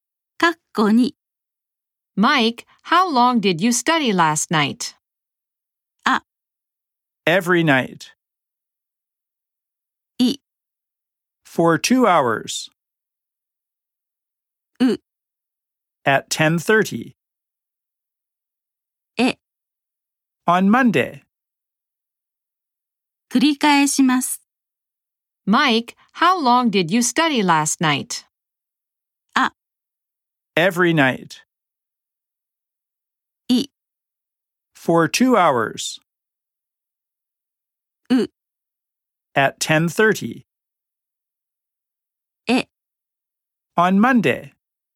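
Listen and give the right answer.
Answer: い: For 2 hours.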